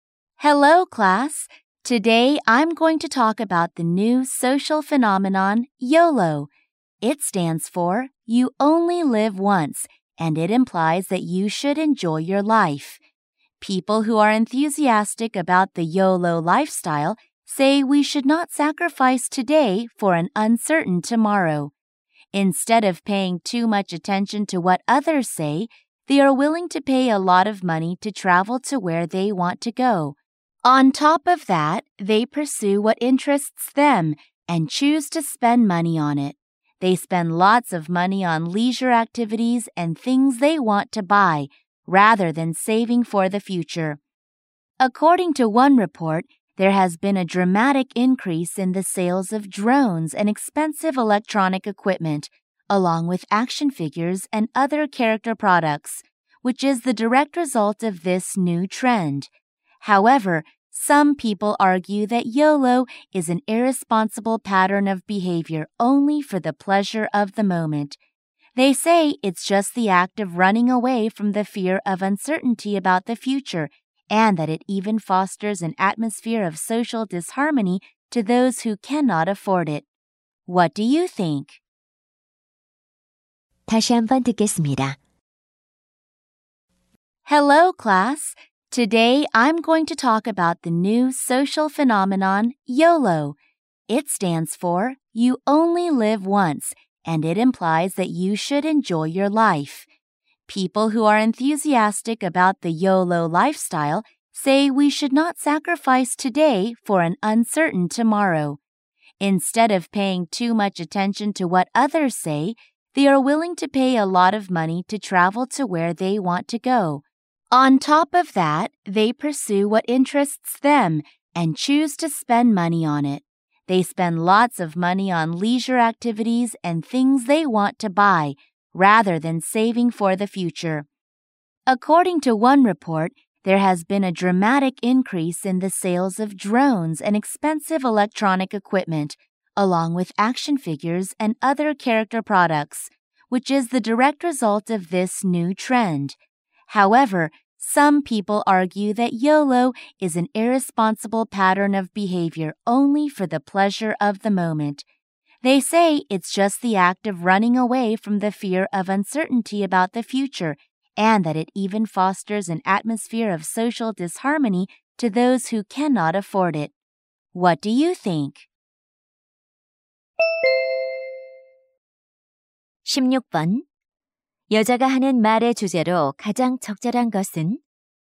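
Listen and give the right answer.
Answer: 새로운 사회 현상인 욜로(YOLO)에 대한 찬반 시각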